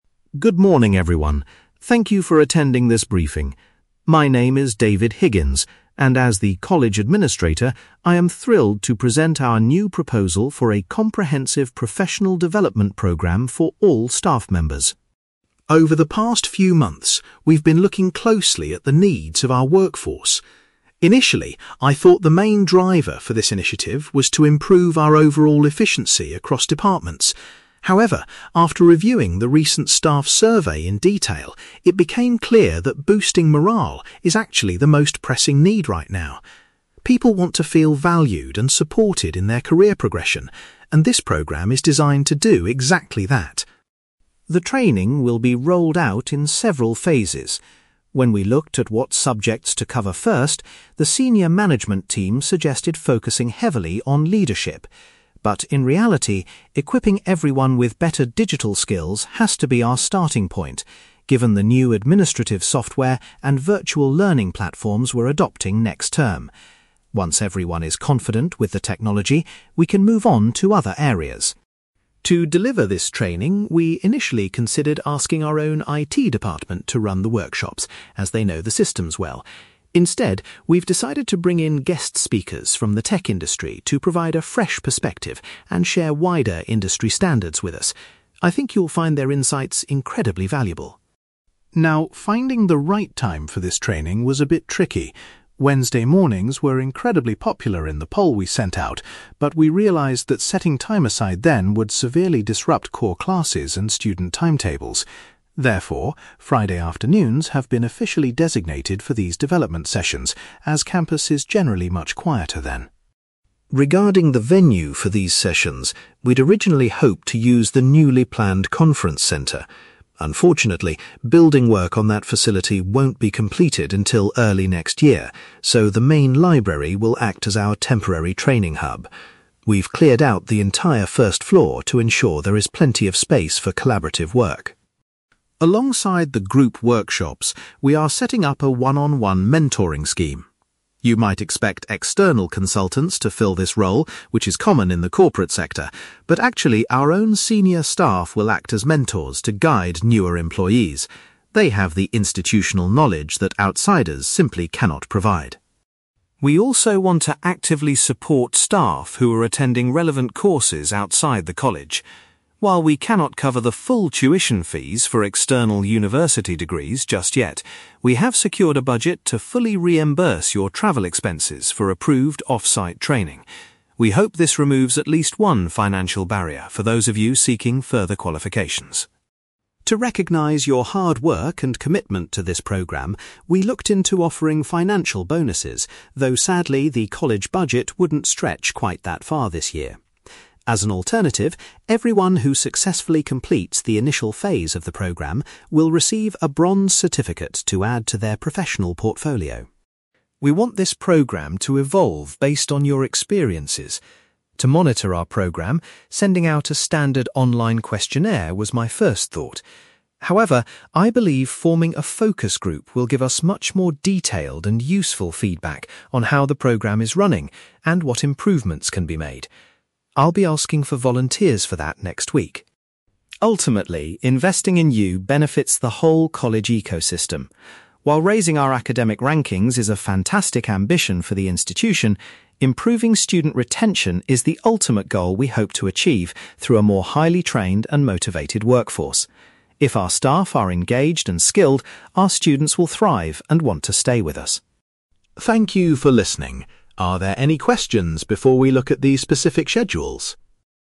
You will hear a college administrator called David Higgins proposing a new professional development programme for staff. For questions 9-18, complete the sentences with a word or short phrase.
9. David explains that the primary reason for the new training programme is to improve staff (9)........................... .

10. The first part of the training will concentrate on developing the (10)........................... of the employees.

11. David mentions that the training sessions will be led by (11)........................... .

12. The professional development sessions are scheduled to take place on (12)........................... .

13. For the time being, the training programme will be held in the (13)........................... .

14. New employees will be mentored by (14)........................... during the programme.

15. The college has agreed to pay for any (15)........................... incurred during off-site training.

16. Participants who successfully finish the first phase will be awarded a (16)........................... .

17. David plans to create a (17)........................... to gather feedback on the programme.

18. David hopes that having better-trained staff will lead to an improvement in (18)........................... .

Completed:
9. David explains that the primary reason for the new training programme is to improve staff morale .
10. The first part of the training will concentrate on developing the digital skills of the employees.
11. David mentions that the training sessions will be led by guest speakers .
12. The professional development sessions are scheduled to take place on Friday afternoons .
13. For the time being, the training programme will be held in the main library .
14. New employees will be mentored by senior staff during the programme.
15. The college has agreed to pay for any travel expenses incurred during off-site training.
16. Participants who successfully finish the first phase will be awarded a bronze certificate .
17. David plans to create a focus group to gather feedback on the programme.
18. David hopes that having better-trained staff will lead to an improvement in student retention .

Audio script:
David Higgins: Good morning, everyone. Thank you for attending this briefing. My name is David Higgins, and as the college administrator, I am thrilled to present our new proposal for a comprehensive professional development programme for all staff members.
Over the past few months, we've been looking closely at the needs of our workforce. Initially, I thought the main driver for this initiative was to improve our overall efficiency across departments. However, after reviewing the recent staff survey in detail, it became clear that boosting morale is actually the most pressing need right now. People want to feel valued and supported in their career progression, and this programme is designed to do exactly that.
The training will be rolled out in several phases. When we looked at what subjects to cover first, the senior management team suggested focusing heavily on leadership. But in reality, equipping everyone with better digital skills has to be our starting point, given the new administrative software and virtual learning platforms we're adopting next term. Once everyone is confident with the technology, we can move on to other areas.
To deliver this training, we initially considered asking our own IT department to run the workshops, as they know the systems well. Instead, we've decided to bring in guest speakers from the tech industry to provide a fresh perspective and share wider industry standards with us. I think you'll find their insights incredibly valuable.
Now, finding the right time for this training was a bit tricky. Wednesday mornings were incredibly popular in the poll we sent out, but we realised that setting time aside then would severely disrupt core classes and student timetables. Therefore, Friday afternoons have been officially designated for these development sessions, as campus is generally much quieter then.
Regarding the venue for these sessions, we'd originally hoped to use the newly planned conference centre. Unfortunately, building work on that facility won't be completed until early next year, so the main library will act as our temporary training hub. We've cleared out the entire first floor to ensure there is plenty of space for collaborative work.
Alongside the group workshops, we are setting up a one-on-one mentoring scheme. You might expect external consultants to fill this role, which is common in the corporate sector, but actually, our own senior staff will act as mentors to guide newer employees. They have the institutional knowledge that outsiders simply cannot provide.
We also want to actively support staff who are attending relevant courses outside the college. While we cannot cover the full tuition fees for external university degrees just yet, we have secured a budget to fully reimburse your travel expenses for approved off-site training. We hope this removes at least one financial barrier for those of you seeking further qualifications.
To recognise your hard work and commitment to this programme, we looked into offering financial bonuses, though sadly, the college budget wouldn't stretch quite that far this year. As an alternative, everyone who successfully completes the initial phase of the programme will receive a bronze certificate to add to their professional portfolio.
We want this programme to evolve based on your experiences. To monitor our progress, sending out a standard online questionnaire was my first thought. However, I believe forming a focus group will give us much more detailed and useful feedback on how the programme is running and what improvements can be made. I'll be asking for volunteers for that next week.
Ultimately, investing in you benefits the whole college ecosystem. While raising our academic rankings is a fantastic ambition for the institution, improving student retention is the ultimate goal we hope to achieve through a more highly trained and motivated workforce. If our staff are engaged and skilled, our students will thrive and want to stay with us.
Are there any questions before we look at the specific schedules?

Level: B2